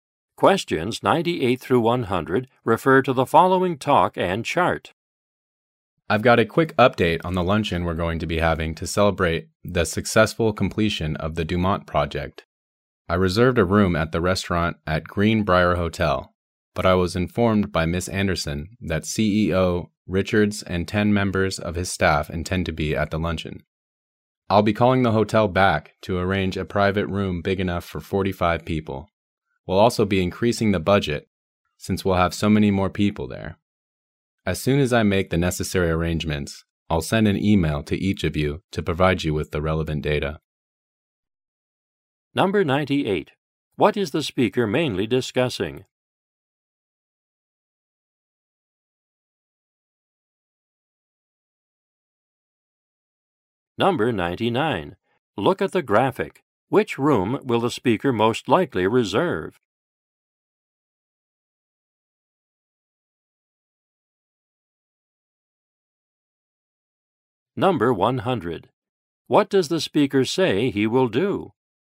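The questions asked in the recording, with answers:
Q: What is the speaker mainly discussing?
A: Arrangements for a luncheon celebrating the Dumont project

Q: What does the speaker say he will do?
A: Call the hotel to book a bigger private room and then email everyone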